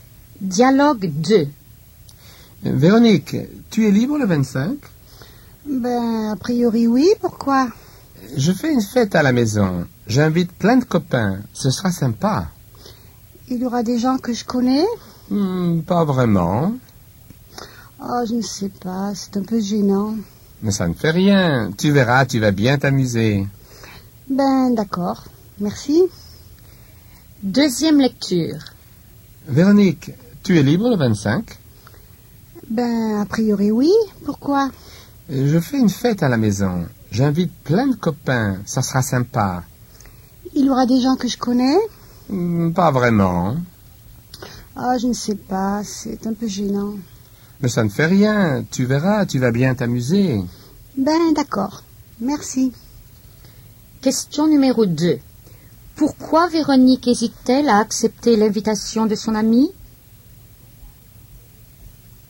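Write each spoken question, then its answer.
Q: Pourquoi Véronique hésite-t-elle à accepter l'invitation de son amie?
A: Parce qu'elle ne connaîtra pas les autres invités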